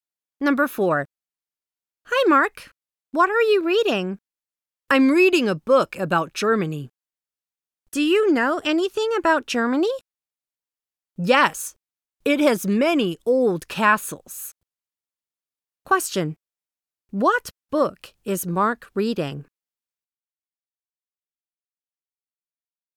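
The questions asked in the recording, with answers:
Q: What book is Mark reading?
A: A book about Germany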